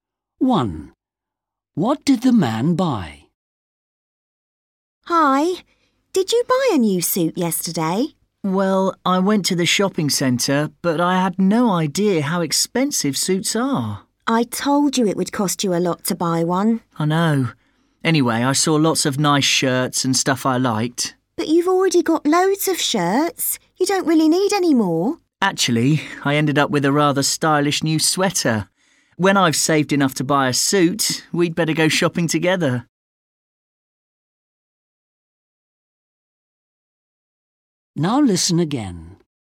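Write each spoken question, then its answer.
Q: What did the man buy?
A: a sweater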